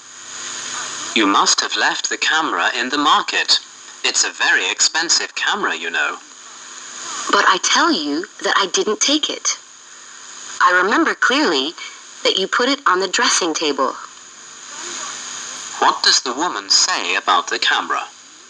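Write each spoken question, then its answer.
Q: What does the woman say about the camera?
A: She didn't take it; it was put on the dressing table.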